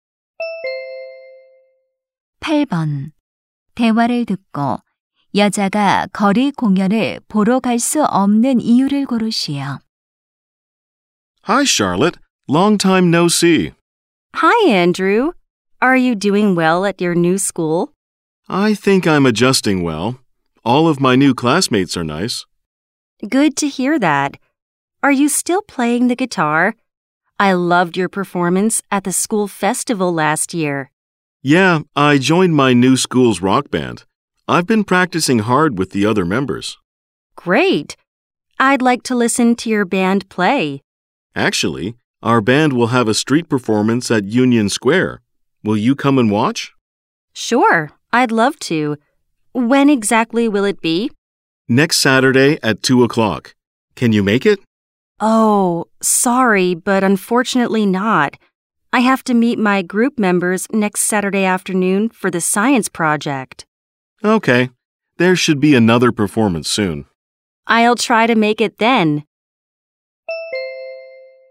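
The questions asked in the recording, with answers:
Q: 대화를 듣고 여자가 거리 공연을 보러 갈 수 없는 이유를 고르시오.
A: 과학 프로젝트 때문에 모둠원들을 만나야 해서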